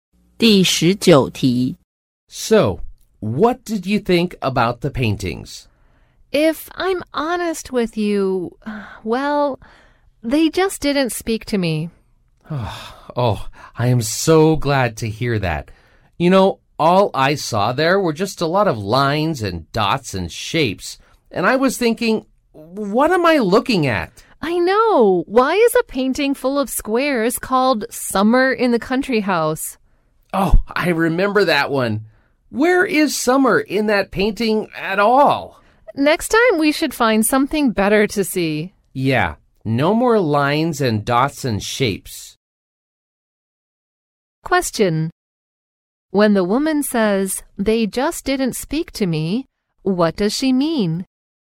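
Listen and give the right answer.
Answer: She didn't like the paintings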